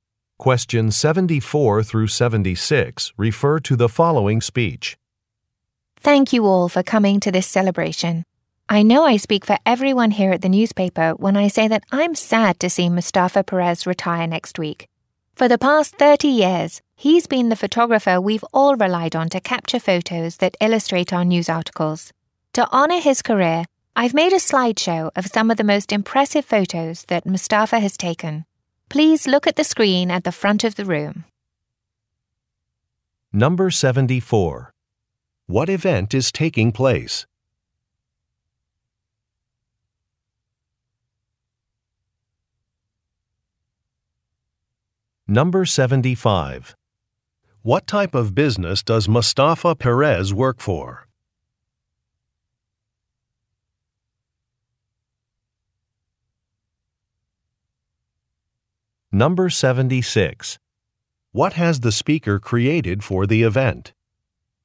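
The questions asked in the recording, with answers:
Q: What event is taking place?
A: A retirement celebration

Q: What type of business does Mustafa Perez work for?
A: A newspaper

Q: What has the speaker created for the event?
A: A slideshow of Mustafa's photos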